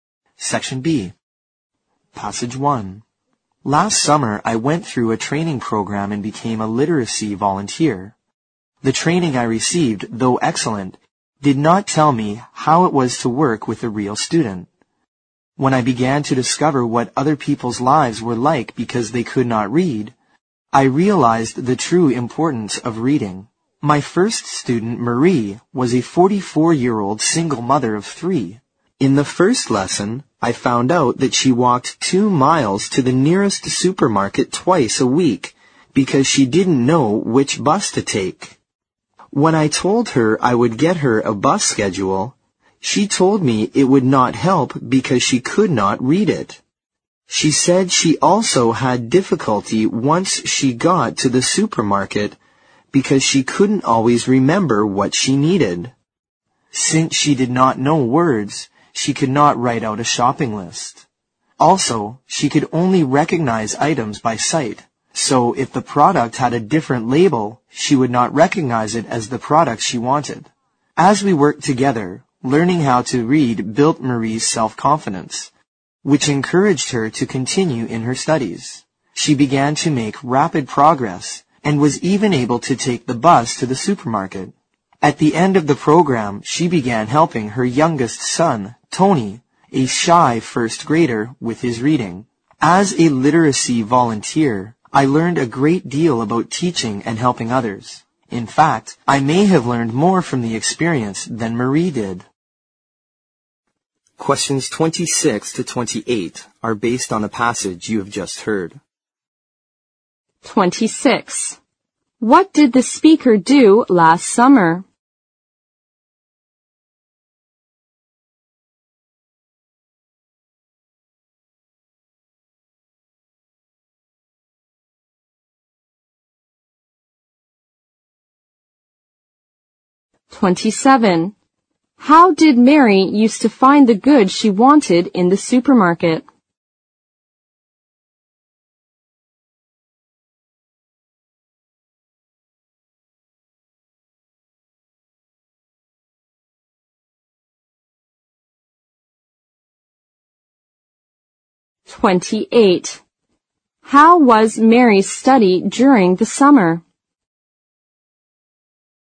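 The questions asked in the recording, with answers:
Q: What did the speaker do last summer?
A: She trained and worked as a literacy volunteer.

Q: How did Mary used to find the goods she wanted in the supermarket?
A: By recognizing items by sight (their labels).

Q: How was Mary's study during the summer?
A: She made rapid progress.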